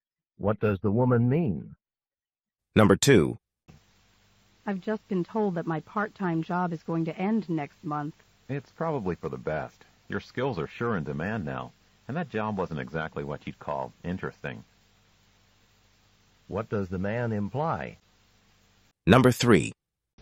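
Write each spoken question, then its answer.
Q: What does the man imply?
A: Losing the job isn't bad; the woman can easily find a better one.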